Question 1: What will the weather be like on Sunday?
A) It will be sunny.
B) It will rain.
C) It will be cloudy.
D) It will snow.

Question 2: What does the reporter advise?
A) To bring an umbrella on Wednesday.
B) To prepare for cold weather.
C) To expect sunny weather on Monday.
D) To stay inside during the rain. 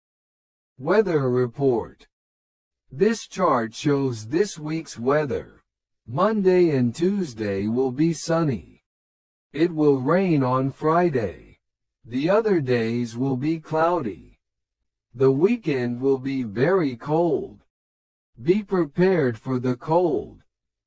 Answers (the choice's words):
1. It will be cloudy.
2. To prepare for cold weather.

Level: 初級者用